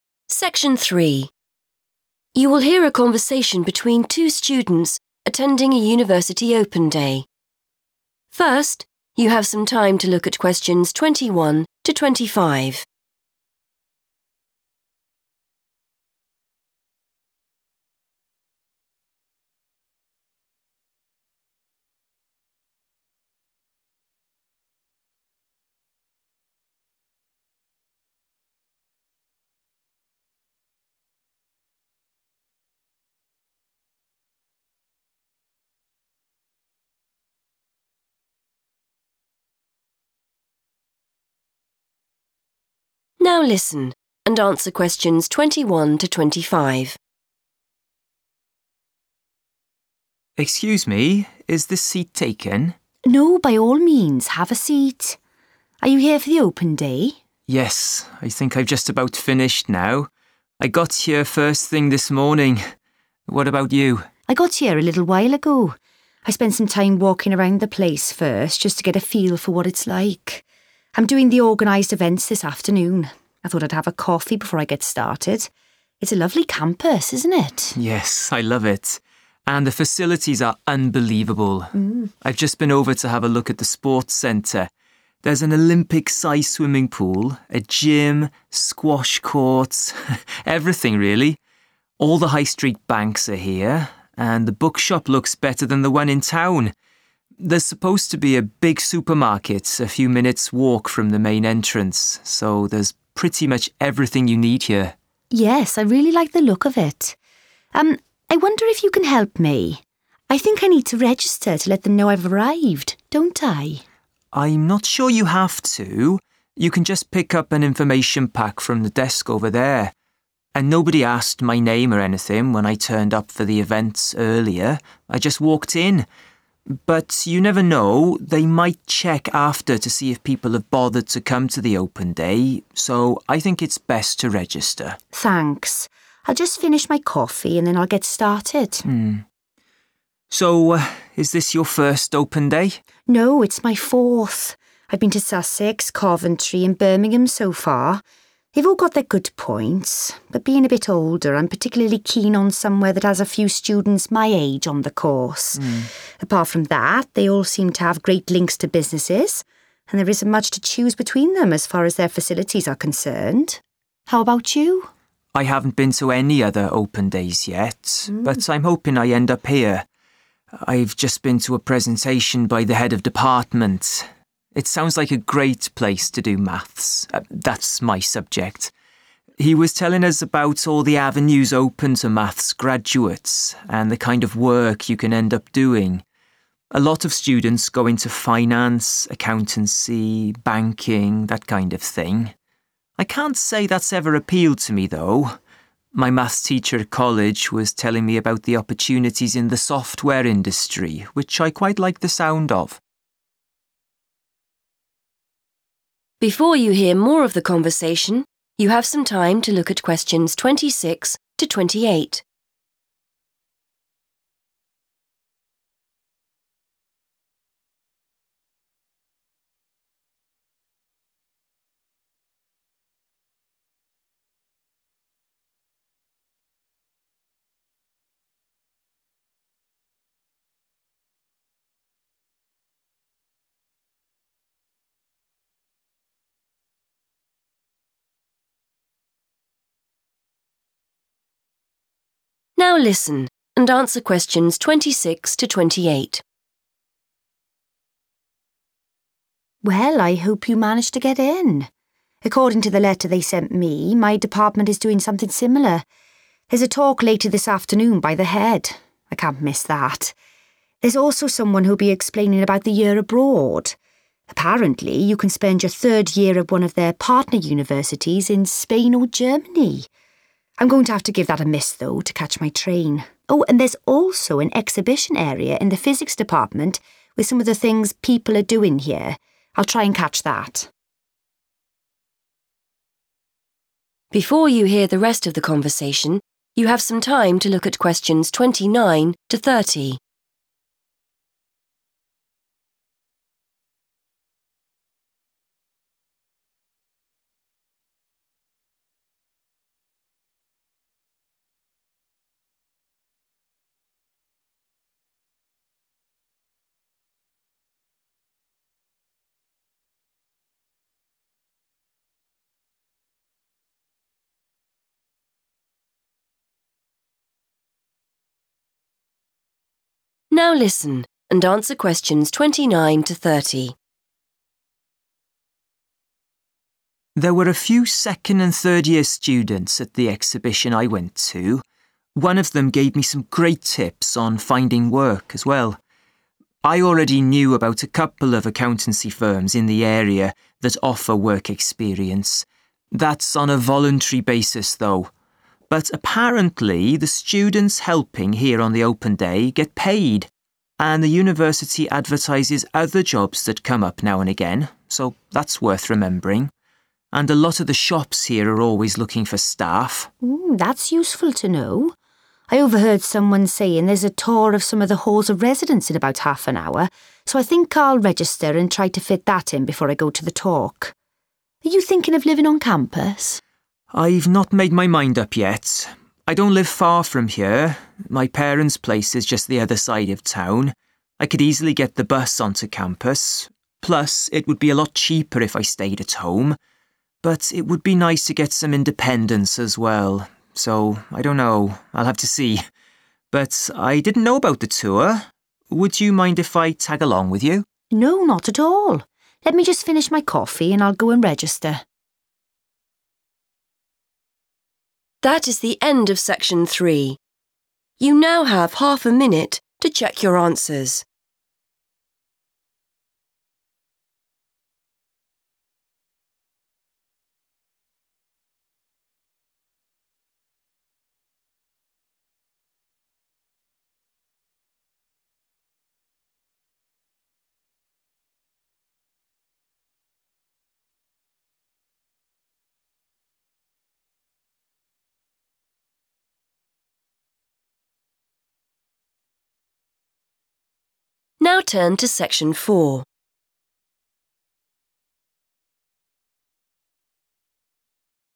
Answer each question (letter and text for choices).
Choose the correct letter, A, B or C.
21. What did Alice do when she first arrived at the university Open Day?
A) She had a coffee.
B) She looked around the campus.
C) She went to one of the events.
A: B) She looked around the campus.

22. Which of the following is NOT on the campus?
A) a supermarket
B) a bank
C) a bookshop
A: A) a supermarket

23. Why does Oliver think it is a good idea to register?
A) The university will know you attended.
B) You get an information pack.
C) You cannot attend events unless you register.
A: A) The university will know you attended.

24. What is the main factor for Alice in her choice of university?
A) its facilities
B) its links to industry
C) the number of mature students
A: C) the number of mature students

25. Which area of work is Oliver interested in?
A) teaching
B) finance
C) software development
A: C) software development

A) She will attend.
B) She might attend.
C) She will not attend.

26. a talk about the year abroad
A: C) She will not attend.

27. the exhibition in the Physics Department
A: B) She might attend.

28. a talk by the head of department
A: A) She will attend.

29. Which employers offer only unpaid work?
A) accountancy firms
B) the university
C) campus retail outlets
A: A) accountancy firms

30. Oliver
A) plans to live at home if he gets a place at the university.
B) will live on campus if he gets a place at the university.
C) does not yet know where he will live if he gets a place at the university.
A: C) does not yet know where he will live if he gets a place at the university.

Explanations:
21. The correct answer is B because Alice explains that after she arrived, she spent time walking around to see what the place was like. She mentions doing this "first," which means it happened before she had her coffee or started any official events. In English, "walking around the place" is a way to say you are looking around a location like a campus.
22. The correct answer is A because Oliver describes the facilities located on the campus and distinguishes between what is 'here' (inside) and what is a short walk away. He mentions that banks and the bookshop are 'here,' meaning they are on campus. However, he notes that the supermarket is a 'few minutes' walk from the main entrance,' which indicates it is located just outside or nearby, rather than within the campus area.
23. The correct answer is supported by Oliver's suggestion that the university might look at the records later. Even though he was able to go to events without showing his name, he thinks it is safer to register just in case the school wants to see who "bothered to come" or attended. This shows that the purpose of registering, in his opinion, is so the university knows you were there.
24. The correct answer is C because Alice explains that she is an older student herself. She uses the phrase 'particularly keen on' to show what is most important to her, which is finding a course with students her age. She notes that while 'facilities' and 'links to businesses' are good, those things are almost the same at all the universities she has seen, so they are not her main reason for choosing one over the others.
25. The correct answer is C because Oliver explains his interest in software development. He mentions that many math students work in finance or banking, but he says those jobs have never 'appealed' to him, meaning he does not find them interesting. Instead, he says that he 'likes the sound of' working in the software industry, which shows it is the career path he prefers.
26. The correct answer is C because Alice explicitly mentions that she will not go to the presentation about the year abroad. She uses the phrase 'give that a miss,' which is a common English idiom meaning to decide not to do or attend something. She explains her reason is that she needs to leave early to catch a train.
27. The correct answer is B because Alice uses the phrase 'I'll try and catch that' when talking about the exhibition in the Physics Department. In English, when someone says they will 'try' to do something, it means they want to do it if they have time or if things work out, but it is not a definite promise. This matches the idea that she 'might' attend rather than 'will' attend for sure.
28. The correct answer is A because Alice specifically mentions a talk by the head of her department that will happen later in the afternoon. She uses the phrase 'I can't miss that,' which in English means she definitely wants or needs to go. This shows her clear intention to attend the event. Other events she mentions, like the information about a year abroad, she says she will 'give that a miss' (not attend), emphasizing that she will choose to go to the head's talk instead.
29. The correct answer is A because Oliver explains that he knows about accountancy firms that offer work experience on a "voluntary basis." In the context of a job, "voluntary" means you do the work for free rather than being paid for it. He contrasts this with jobs at the university, where he specifically mentions that the students "get paid."
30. The correct answer is C because Oliver explicitly states that he has not yet decided where to live. He weighs the pros and cons of two options: staying at his parents' house to save money (living at home) versus living at the university for more freedom (living on campus). Since he says he doesn't know and still needs to see, he has not made a plan yet. Phrases like 'not made my mind up' and 'I'll have to see' are synonyms for 'does not yet know.'

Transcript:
Oliver: Excuse me, is this seat taken?
Alice: No, by all means, have a seat. Are you here for the Open Day?
Oliver: Yes, I think I've just about finished now. I got here first thing this morning. What about you?
Alice: I got here a little while ago. I spent some time walking around the place first, just to get a feel for what it's like. I'm doing the organised events this afternoon. I thought I'd have a coffee before I get started. It's a lovely campus, isn't it?
Oliver: Yes, I love it. And the facilities are unbelievable. I've just been over to have a look at the sports centre. There's an Olympic size swimming pool, a gym, squash courts, everything really. All the high street banks are here, and the bookshop looks better than the one in town. There's supposed to be a big supermarket a few minutes' walk from the main entrance, so there's pretty much everything you need here.
Alice: Yes, I really like the look of it ... Um, I wonder if you can help me. I think I need to register to let them know I've arrived, don't I?
Oliver: I'm not sure you have to. You can just pick up an information pack from the desk over there. And nobody asked my name or anything when I turned up for the events earlier. I just walked in. But you never know; they might check after to see if people have bothered to come to the Open Day, so I think it's best to register.
Alice: Thanks. I'll just finish my coffee and then I'll get started.
Oliver: So, is this your first Open Day?
Alice: No, it's my fourth. I've been to Sussex, Coventry and Birmingham so far. They've all got their good points. But being a bit older, I'm particularly keen on somewhere that has a few students my age on the course. Apart from that, they all seem to have great links to businesses, and there isn't much to choose between them as far as their facilities are concerned. How about you?
Oliver: I haven't been to any other Open Days yet but I'm hoping I end up here. I've just been to a presentation by the Head of Department. It sounds like a great place to do Maths - that's my subject. He was telling us about all the avenues open to Maths graduates and the kind of work you can end up doing. A lot of students go into finance, accountancy, banking, that kind of thing. I can't say that's ever appealed to me, though. My Maths teacher at college was telling me about the opportunities in the software industry, which I quite like the sound of.
Alice: Well, I hope you manage to get in. According to the letter they sent me, my department is doing something similar. There's a talk later this afternoon by the head. I can't miss that. There's also someone who'll be explaining about the year abroad. Apparently, you can spend your third year at one of their partner universities in Spain or Germany. I'm going to have to give that a miss, though, to catch my train. Oh, and there's also an exhibition area in the Physics Department with some of the things people are doing here. I'll try and catch that.
Oliver: There were a few second- and third-year students at the exhibition I went to. One of them gave me some great tips on finding work as well. I already knew about a couple of accountancy firms in the area that offer work experience. That's on a voluntary basis, though. But apparently the students helping here on the Open Day get paid, and the university advertises other jobs that come up now and again, so that's worth remembering. And a lot of the shops here are always looking for staff.
Alice: Mm, that's useful to know. I overheard someone saying there's a tour of some of the halls of residence in about half an hour, so I think I'll register and try to fit that in before I go to the talk. Are you thinking of living on campus?
Oliver: I've not made my mind up yet. I don't live far from here. My parents' place is just the other side of town. I could easily get the bus to campus, plus it would be a lot cheaper if I stayed at home. But it would be nice to get some independence as well, so I don't know. I'll have to see. But I didn't know about the tour. Would you mind if I tag along with you?
Alice: No, not at all. Let me just finish my coffee and I'll go and register.